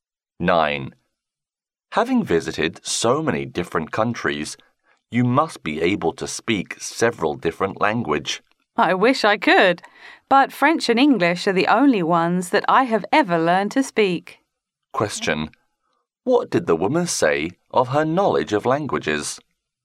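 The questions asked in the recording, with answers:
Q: What did the woman say of her knowledge of languages?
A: She can speak only French and English.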